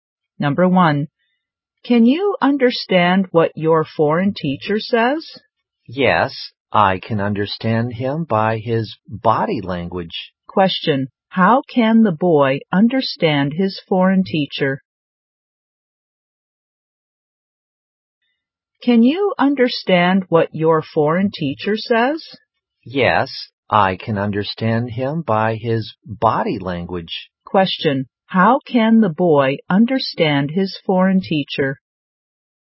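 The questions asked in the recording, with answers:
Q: How can the boy understand his foreign teacher?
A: By his body language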